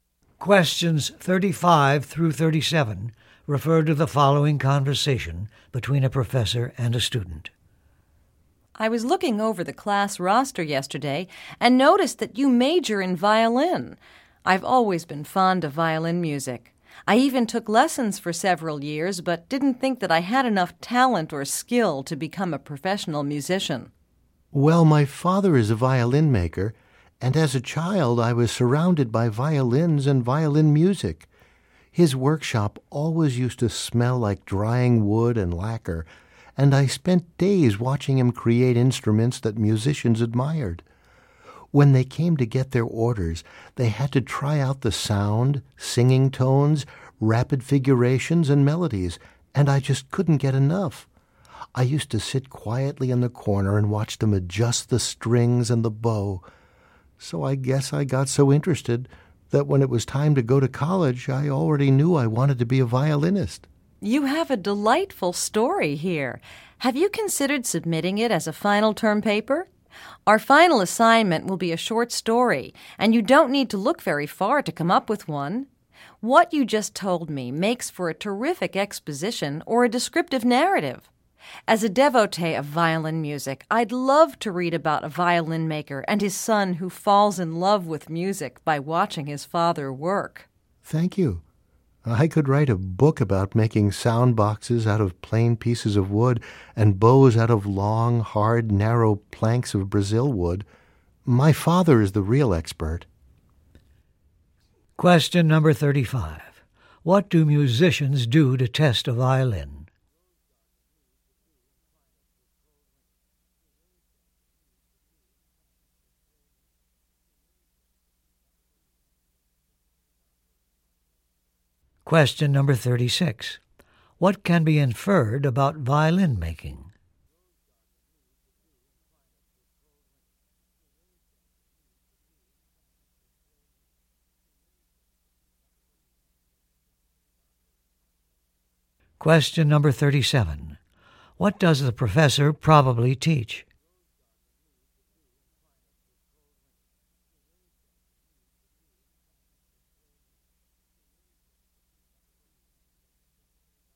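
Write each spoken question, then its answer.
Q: What do musicians do to test a violin?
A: They play singing tones, rapid figurations and melodies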